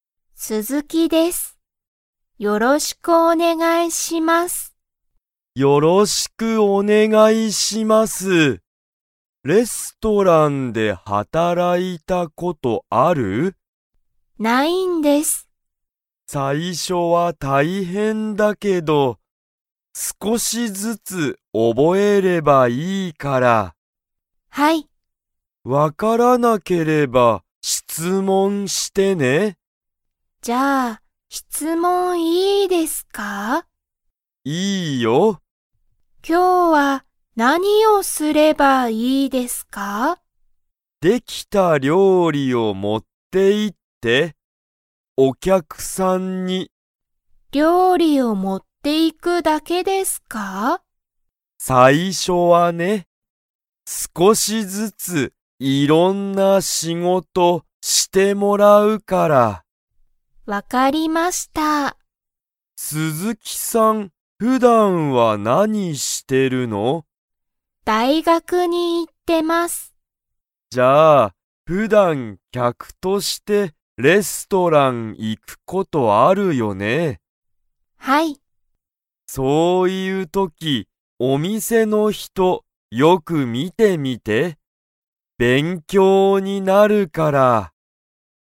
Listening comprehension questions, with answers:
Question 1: 鈴木すずきさんはレストランで働はたらいたことがありますか?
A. はい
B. いいえ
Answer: いいえ

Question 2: 鈴木すずきさんは普段ふだん、 に行いっている。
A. ほかの仕事しごと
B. 大学だいがく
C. 料理りょうり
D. 質問しつもん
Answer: 大学だいがく

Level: Level 3

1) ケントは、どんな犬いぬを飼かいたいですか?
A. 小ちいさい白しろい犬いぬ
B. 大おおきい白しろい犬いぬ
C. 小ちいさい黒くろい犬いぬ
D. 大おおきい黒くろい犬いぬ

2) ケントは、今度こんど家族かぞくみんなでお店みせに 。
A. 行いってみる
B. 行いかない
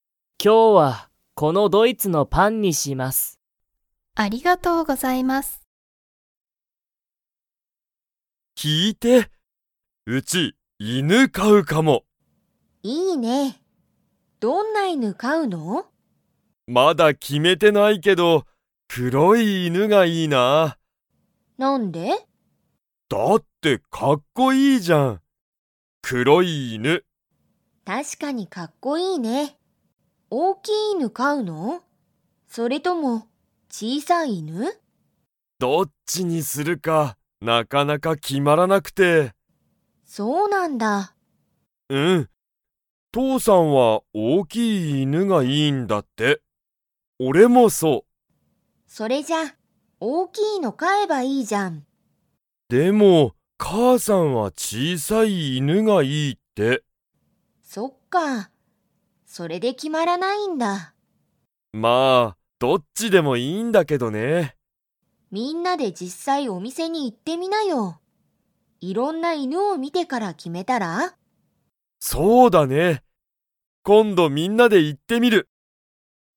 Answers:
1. 大おおきい黒くろい犬いぬ
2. 行いってみる

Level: Level 4

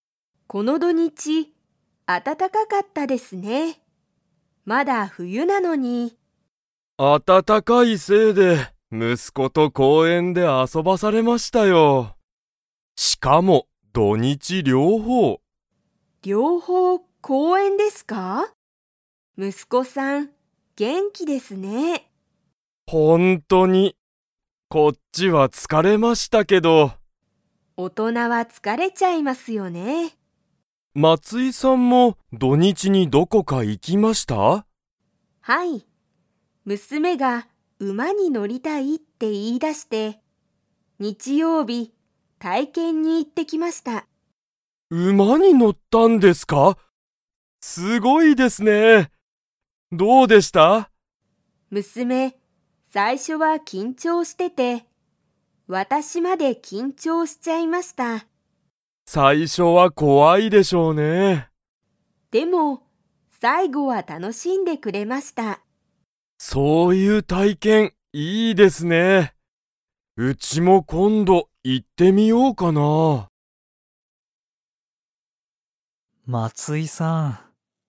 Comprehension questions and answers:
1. 斉藤さいとうさんは、土曜日どようびだけ息子むすこと公園こうえんで遊あそびましたか?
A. はい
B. いいえ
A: いいえ

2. 松井まついさんの娘むすめは、 に乗のった。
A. 犬いぬ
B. 車くるま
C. 電車でんしゃ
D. 馬うま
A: 馬うま

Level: Level 4

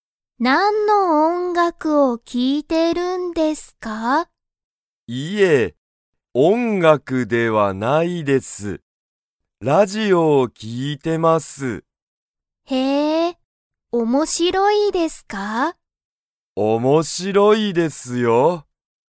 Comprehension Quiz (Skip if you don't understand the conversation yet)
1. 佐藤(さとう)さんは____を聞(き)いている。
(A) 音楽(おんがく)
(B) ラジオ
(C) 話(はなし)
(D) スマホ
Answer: ラジオ

